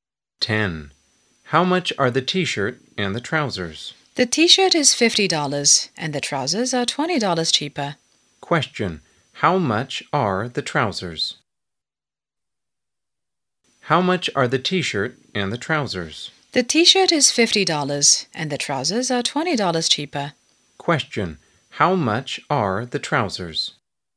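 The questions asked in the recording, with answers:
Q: How much are the trousers?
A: $30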